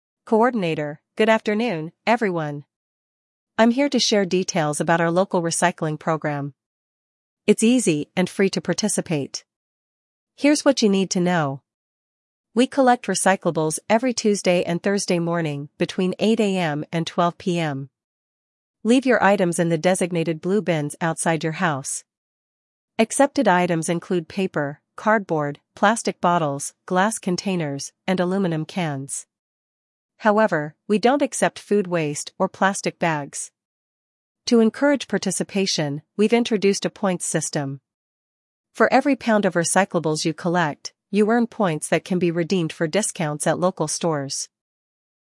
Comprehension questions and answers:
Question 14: On which days are recyclables collected?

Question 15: What time do collections occur?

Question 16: Which items are accepted for recycling?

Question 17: What is not accepted in the program?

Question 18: How can participants earn points?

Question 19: What can the points be used for?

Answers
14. Tuesday and Thursday
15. 8 AM–12 PM
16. Paper, cardboard, plastic bottles, glass, aluminum
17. Food waste and plastic bags
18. By collecting recyclables
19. Store discounts

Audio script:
Coordinator: Good afternoon, everyone! I'm here to share details about our local Recycling Program. It's easy and free to participate. Here's what you need to know:
We collect recyclables every Tuesday and Thursday morning between 8 AM and 12 PM. Leave your items in the designated blue bins outside your house.
Accepted items include paper, cardboard, plastic bottles, glass containers, and aluminum cans. However, we don't accept food waste or plastic bags.
To encourage participation, we've introduced a points system. For every pound of recyclables you collect, you earn points that can be redeemed for discounts at local stores.